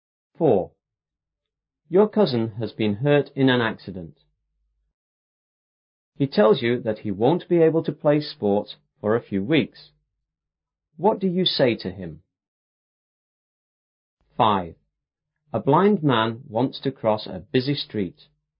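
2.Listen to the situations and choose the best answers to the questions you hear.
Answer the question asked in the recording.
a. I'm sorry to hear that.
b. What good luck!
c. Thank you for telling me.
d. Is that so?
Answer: a. I'm sorry to hear that.

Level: 初中英语广州版5B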